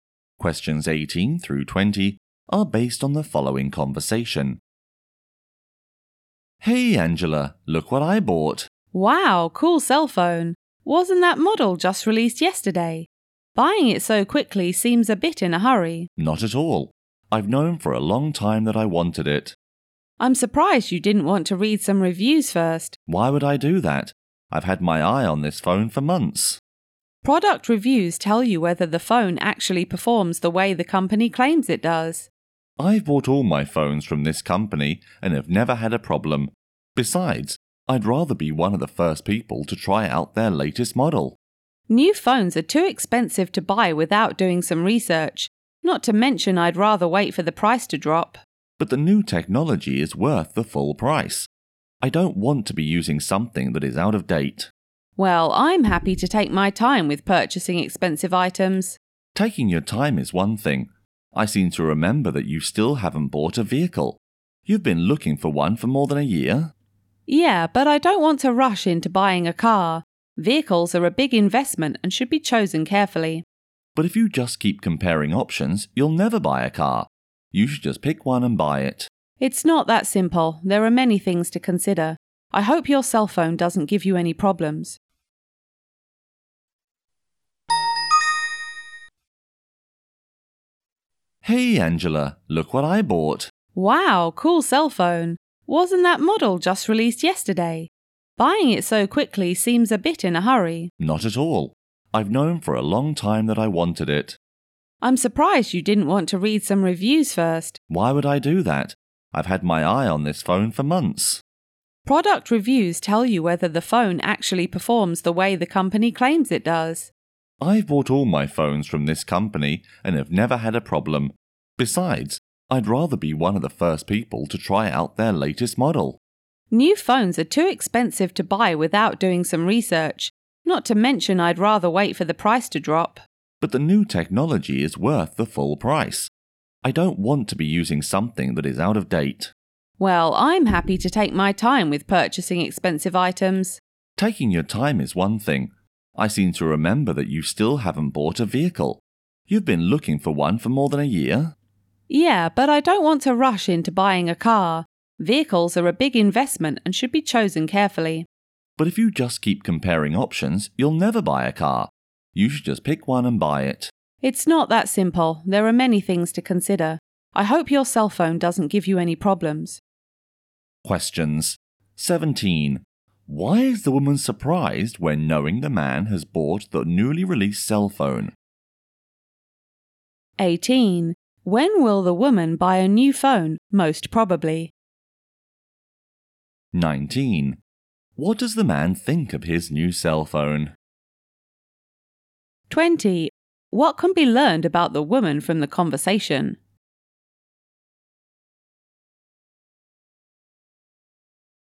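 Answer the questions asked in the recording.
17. He didn't read any reviews first
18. After the price drops
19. It is worth the full price
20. She is careful about buying expensive things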